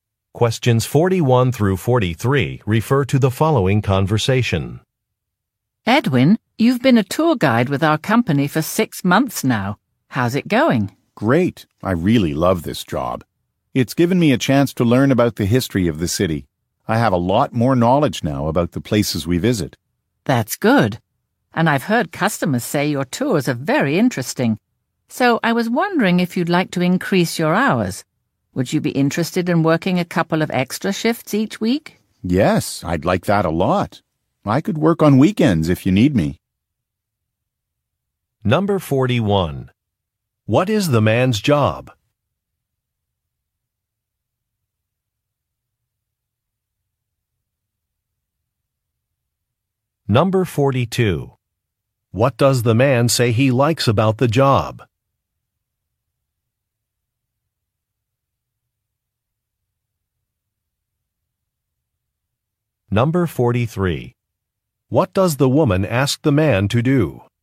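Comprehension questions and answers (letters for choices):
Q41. What is the man's job?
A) University professor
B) Newspaper reporter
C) Flight attendant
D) Tour guide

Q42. What does the man say he likes about the job?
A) Meeting city officials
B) Traveling to other countries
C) Learning about local history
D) Attending special celebrations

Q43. What does the woman ask the man to do?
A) Write an article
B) Work more hours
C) Train new employees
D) Organize an event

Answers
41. D
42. C
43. B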